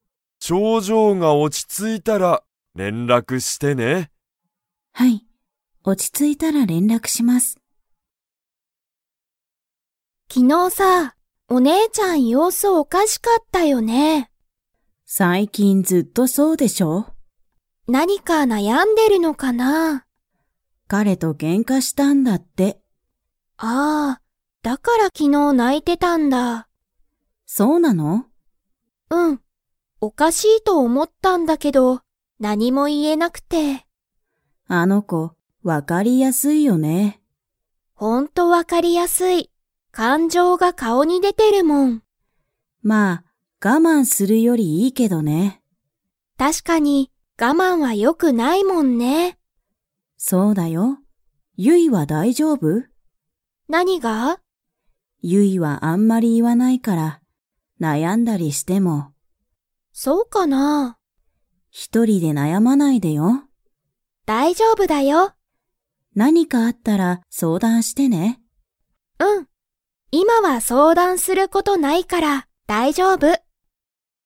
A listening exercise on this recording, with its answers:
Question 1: お姉ねえちゃんは、彼かれと何なにをしましたか?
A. 旅行りょこう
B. 勉強べんきょう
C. 仕事しごと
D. けんか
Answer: けんか

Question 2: ユイは今いま、相談そうだんすることが 。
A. ある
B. ない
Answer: ない

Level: Level 4

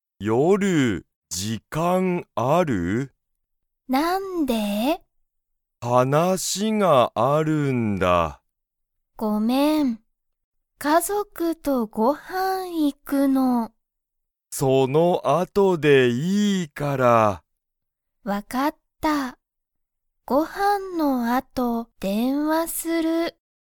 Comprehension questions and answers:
まさしは、けいこに____がある。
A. ご飯(はん)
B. 時間(じかん)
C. 家族(かぞく)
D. 話(はなし)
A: 話(はなし)

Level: Level 1

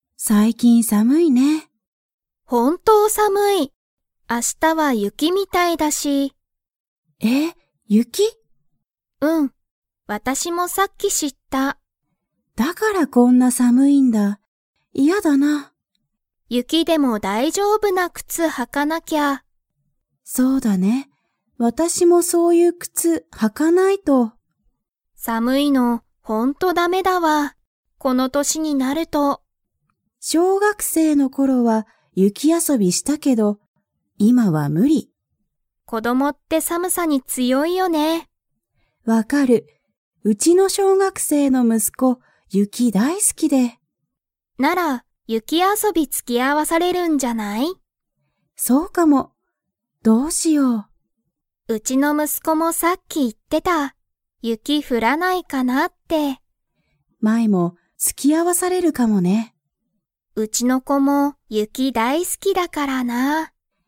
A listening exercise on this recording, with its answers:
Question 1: マイは、 がほんとだめだ、と言いっている。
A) 寒さむいの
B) 暑あついの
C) 忙いそがしいの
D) 困こまるの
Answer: 寒さむいの

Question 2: マイの息子むすこは、雪ゆきが嫌きらいですか?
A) はい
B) いいえ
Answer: いいえ

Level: Level 4

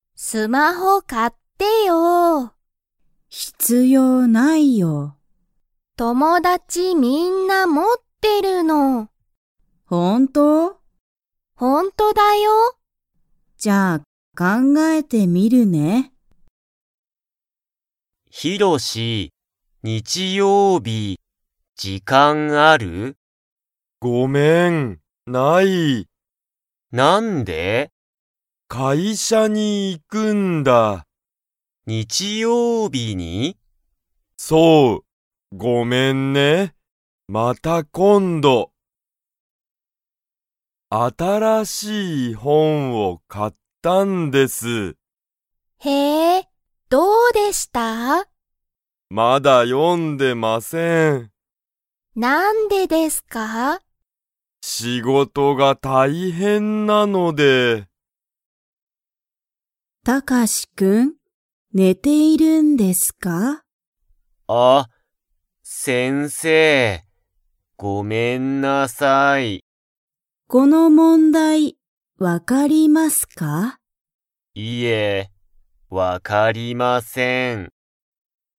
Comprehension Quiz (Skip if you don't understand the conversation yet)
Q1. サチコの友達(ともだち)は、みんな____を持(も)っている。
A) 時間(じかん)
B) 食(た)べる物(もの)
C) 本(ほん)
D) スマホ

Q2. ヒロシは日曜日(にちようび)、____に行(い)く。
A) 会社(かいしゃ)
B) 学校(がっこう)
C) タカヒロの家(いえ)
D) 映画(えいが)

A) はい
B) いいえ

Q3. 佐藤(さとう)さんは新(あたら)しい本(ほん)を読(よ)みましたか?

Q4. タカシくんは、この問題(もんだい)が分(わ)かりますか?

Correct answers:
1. スマホ
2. 会社(かいしゃ)
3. いいえ
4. いいえ

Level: Level 1

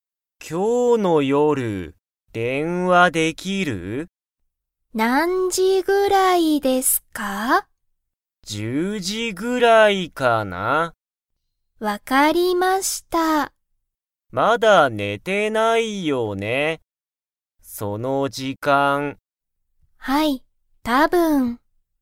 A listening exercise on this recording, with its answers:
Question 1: しんじは、今日(きょう)の夜(よる)____。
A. 寝(ね)たくない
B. けいこと勉強(べんきょう)する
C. けいこに電話(でんわ)する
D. ご飯(はん)を食(た)べたい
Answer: けいこに電話(でんわ)する

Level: Level 1

